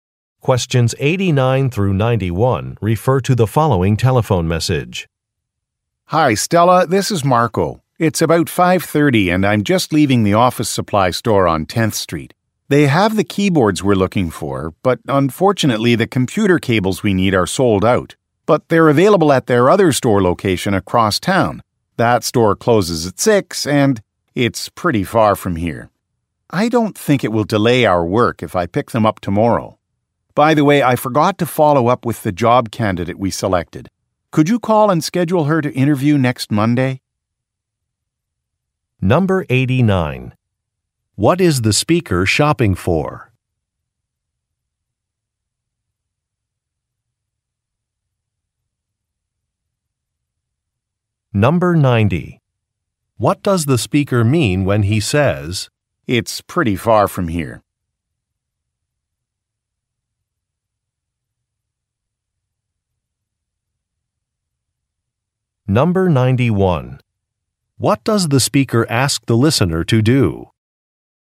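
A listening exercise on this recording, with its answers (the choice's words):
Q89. What is the speaker shopping for?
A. Groceries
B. Kitchen appliances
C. Sporting goods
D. Computer accessories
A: Computer accessories

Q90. What does the speaker mean when he says, "It's pretty far from here"?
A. He is unable to complete a task today.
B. He will need to borrow a car.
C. He may be late for an appointment.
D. He needs driving directions.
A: He is unable to complete a task today.

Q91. What does the speaker ask the listener to do?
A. Print a document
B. Address some letters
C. Arrange an interview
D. Process a refund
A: Arrange an interview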